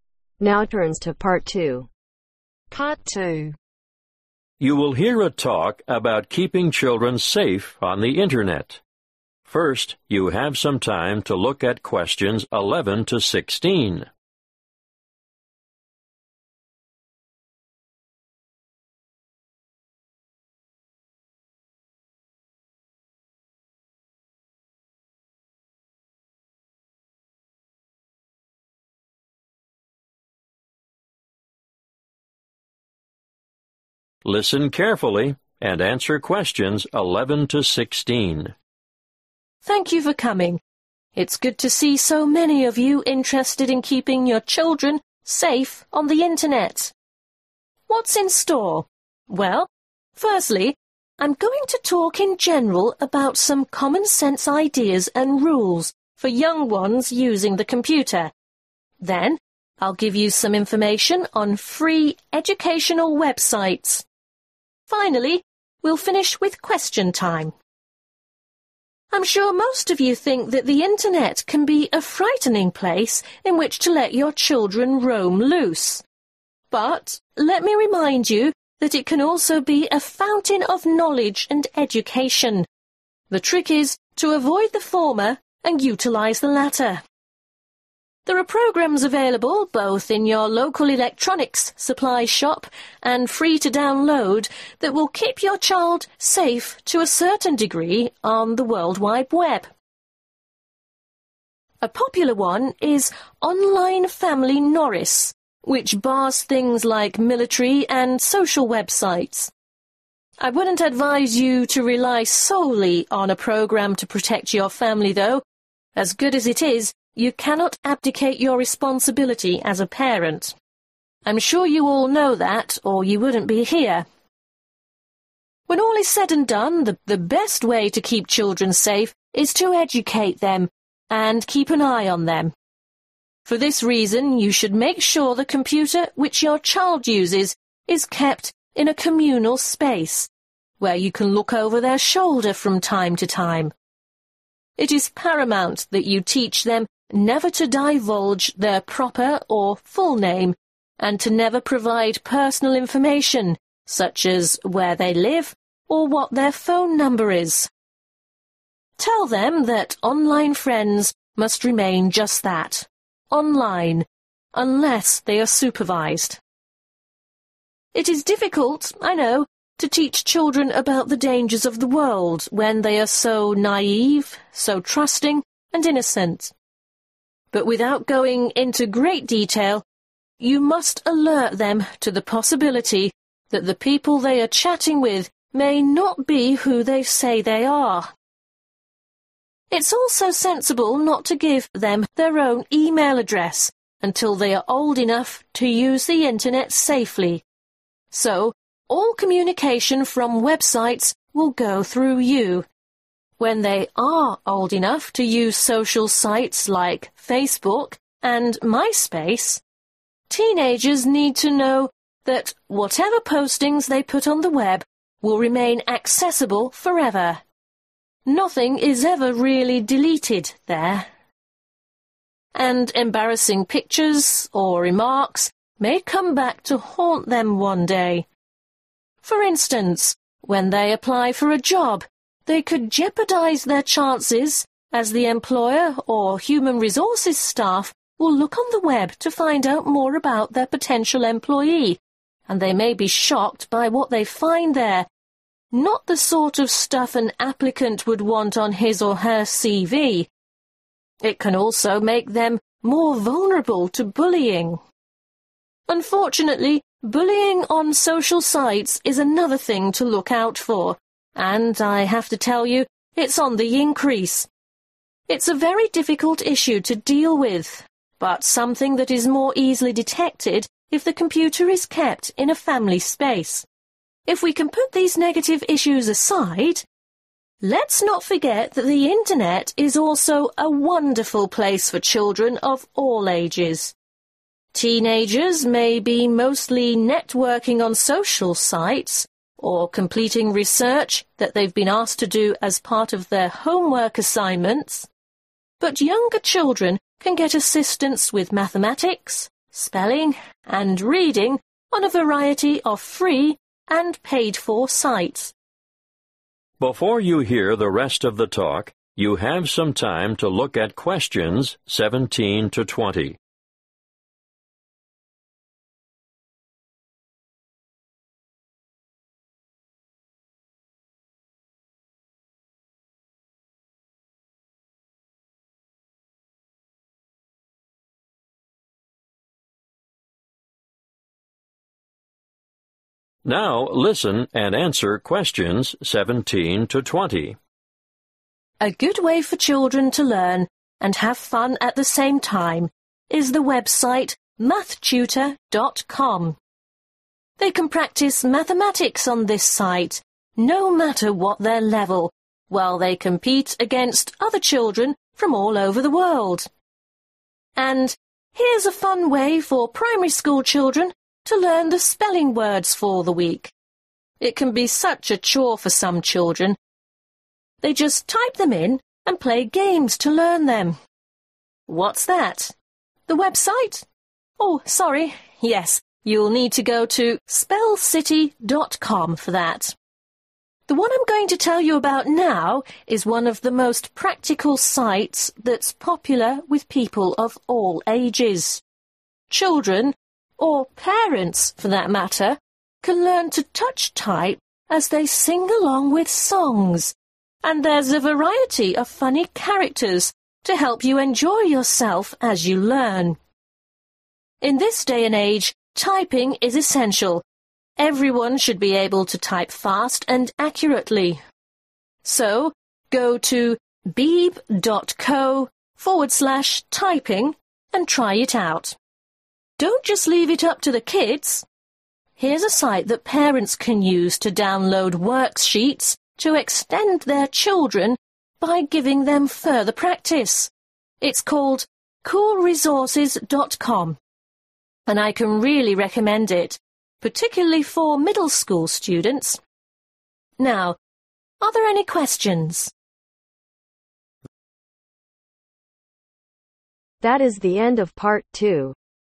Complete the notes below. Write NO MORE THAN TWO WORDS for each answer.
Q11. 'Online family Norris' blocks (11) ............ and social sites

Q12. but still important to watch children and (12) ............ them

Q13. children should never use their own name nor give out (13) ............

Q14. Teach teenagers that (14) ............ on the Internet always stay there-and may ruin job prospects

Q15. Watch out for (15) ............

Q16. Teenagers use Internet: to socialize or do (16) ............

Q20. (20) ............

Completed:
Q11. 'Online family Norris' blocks Military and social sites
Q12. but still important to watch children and educate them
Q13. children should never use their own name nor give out personal information
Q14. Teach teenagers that postings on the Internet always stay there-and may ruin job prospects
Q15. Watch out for bullying
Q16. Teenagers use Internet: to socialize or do research/homework, assignments
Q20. worksheets